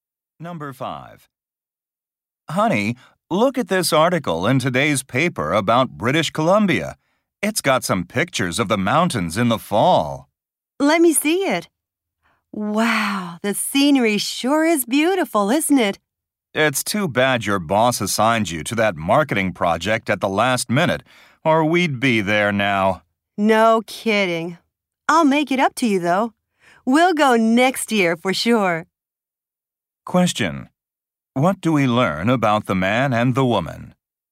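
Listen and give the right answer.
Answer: They had to cancel their trip to British Columbia because of the man's work.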